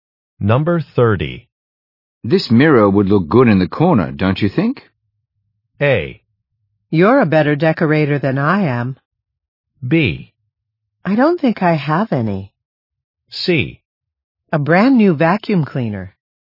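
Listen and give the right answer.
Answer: A: You're a better decorator than I am.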